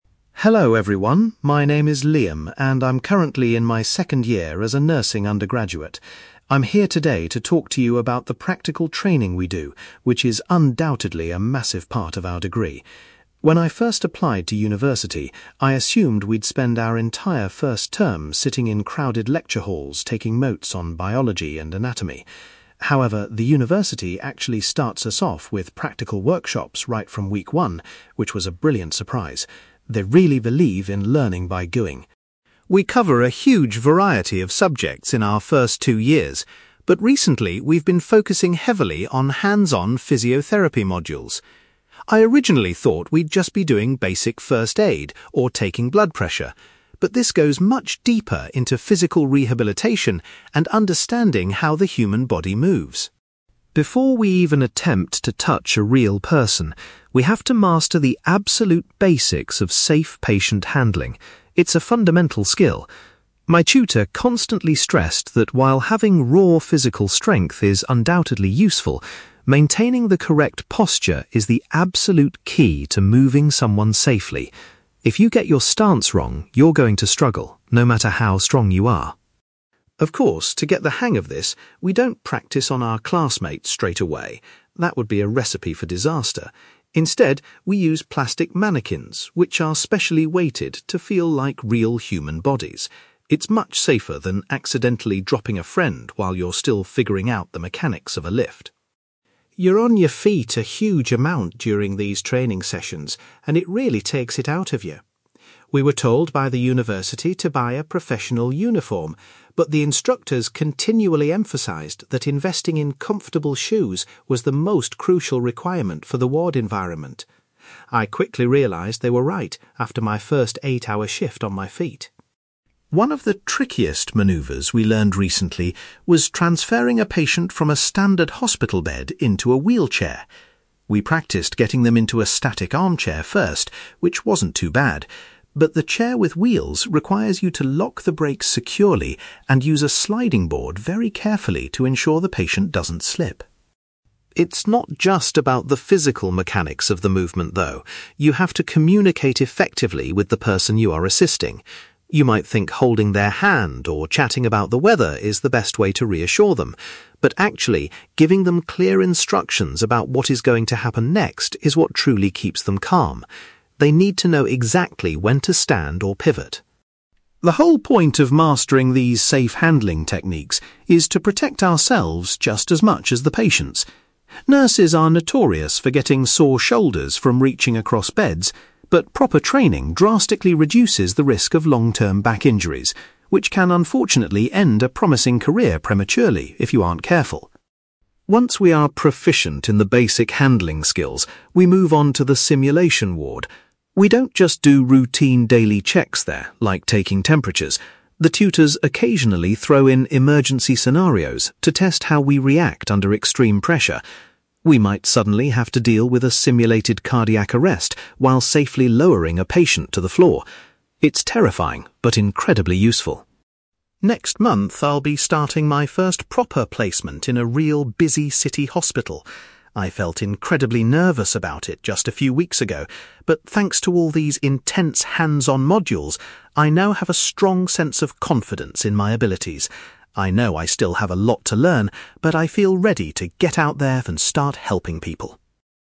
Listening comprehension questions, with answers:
You will hear a nursing undergraduate called Liam talking about his practical training. For questions 9-18, complete the sentences with a word or short phrase.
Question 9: Liam was surprised that his course began with (9)........................... rather than lectures.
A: practical workshops

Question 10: Liam is currently taking part in (10)........................... which involve physical rehabilitation.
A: physiotherapy modules

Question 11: According to Liam's tutor, having the right (11)........................... is essential when handling patients safely.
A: posture

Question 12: The students practice their lifting techniques on (12)........................... instead of real people.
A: plastic mannequins

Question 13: Liam learned that wearing (13)........................... is highly important for working on the wards.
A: comfortable shoes

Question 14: Liam found it particularly challenging to move a patient from a bed to a (14)........................... .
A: wheelchair

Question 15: Liam explains that patients are best reassured by receiving (15)........................... before being moved.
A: clear instructions

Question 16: Using the correct lifting methods helps nurses avoid serious (16)........................... over the course of their careers.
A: back injuries

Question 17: In the simulation ward, students are sometimes faced with unexpected (17)........................... to see how they cope.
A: emergency scenarios

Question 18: Liam feels that the practical training has given him a lot of (18)........................... ahead of his hospital placement.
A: confidence

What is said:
Liam: Hello everyone, my name is Liam, and I'm currently in my second year as a nursing undergraduate. I'm here today to talk to you about the practical training we do, which is undoubtedly a massive part of our degree. When I first applied to university, I assumed we'd spend our entire first term sitting in crowded lecture halls taking notes on biology and anatomy. However, the university actually starts us off with practical workshops right from week one, which was a brilliant surprise. They really believe in learning by doing.
We cover a huge variety of subjects in our first two years, but recently we've been focusing heavily on hands-on physiotherapy modules. I originally thought we'd just be doing basic first aid or taking blood pressure, but this goes much deeper into physical rehabilitation and understanding how the human body moves.
Before we even attempt to touch a real person, we have to master the absolute basics of safe patient-handling. It's a fundamental skill. My tutor constantly stressed that while having raw physical strength is undoubtedly useful, maintaining the correct posture is the absolute key to moving someone safely. If you get your stance wrong, you're going to struggle, no matter how strong you are.
Of course, to get the hang of this, we don't practice on our classmates straight away. That would be a recipe for disaster! Instead, we use plastic mannequins which are specially weighted to feel like real human bodies. It's much safer than accidentally dropping a friend while you're still figuring out the mechanics of a lift.
You're on your feet a huge amount during these training sessions, and it really takes it out of you. We were told by the university to buy a professional uniform, but the instructors continually emphasised that investing in comfortable shoes was the most crucial requirement for the ward environment. I quickly realised they were right after my first eight-hour shift on my feet!
One of the trickiest manoeuvres we learned recently was transferring a patient from a standard hospital bed into a wheelchair. We practiced getting them into a static armchair first, which wasn't too bad, but the chair with wheels requires you to lock the brakes securely and use a sliding board very carefully to ensure the patient doesn't slip.
It's not just about the physical mechanics of the movement, though. You have to communicate effectively with the person you are assisting. You might think holding their hand or chatting about the weather is the best way to reassure them, but actually, giving them clear instructions about what is going to happen next is what truly keeps them calm. They need to know exactly when to stand or pivot.
The whole point of mastering these safe handling techniques is to protect ourselves just as much as the patients. Nurses are notorious for getting sore shoulders from reaching across beds, but proper training drastically reduces the risk of long-term back injuries, which can unfortunately end a promising career prematurely if you aren't careful.
Once we are proficient in the basic handling skills, we move on to the simulation ward. We don't just do routine daily checks there, like taking temperatures; the tutors occasionally throw in emergency scenarios to test how we react under extreme pressure. We might suddenly have to deal with a simulated cardiac arrest while safely lowering a patient to the floor. It's terrifying but incredibly useful.
Next month, I'll be starting my first proper placement in a real, busy city hospital. I felt incredibly nervous about it just a few weeks ago, but thanks to all these intense hands-on modules, I now have a strong sense of confidence in my abilities. I know I still have a lot to learn, but I feel ready to get out there and start helping people.

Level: B2